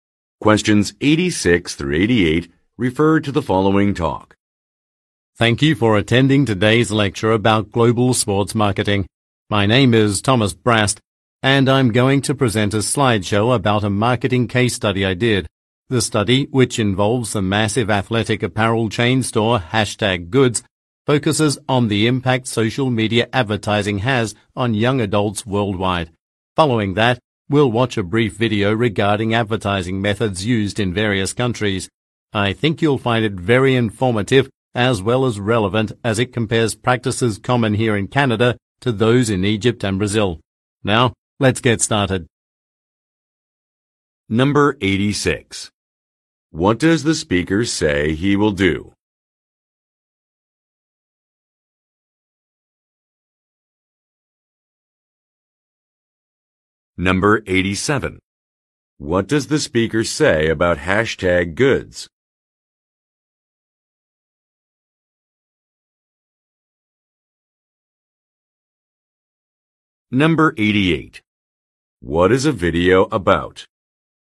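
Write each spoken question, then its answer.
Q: What does the speaker say he will do?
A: Present a slideshow about a marketing case study

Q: What does the speaker say about #goods?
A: It is a massive athletic apparel chain store

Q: What is a video about?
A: Advertising methods used in various countries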